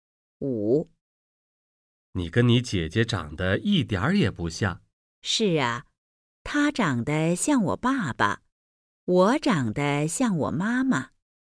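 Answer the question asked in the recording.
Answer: 姐姐像爸爸,妹妹像妈妈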